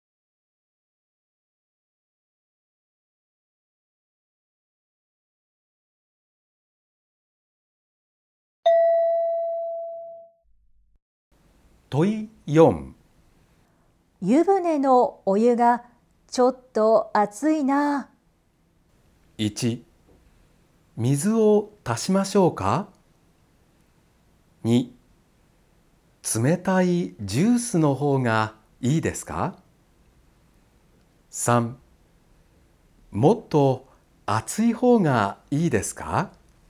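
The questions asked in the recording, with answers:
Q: 湯船のお湯がちょっと熱いな。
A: 1: 水を足しましょうか。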